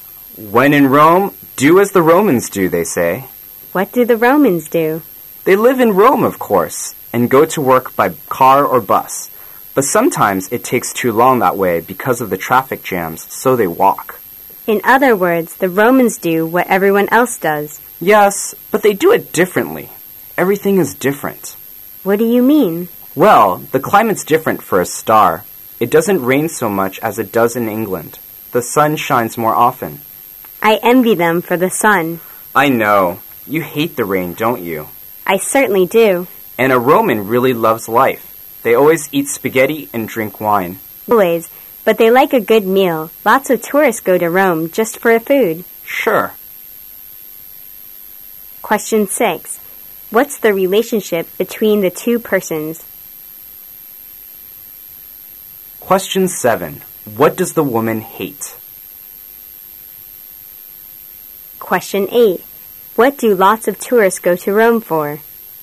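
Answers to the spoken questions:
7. The rain
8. The food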